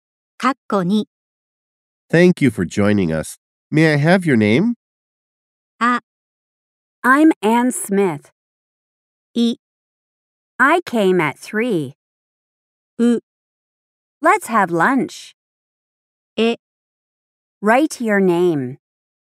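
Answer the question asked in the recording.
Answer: あ: I'm Ann Smith.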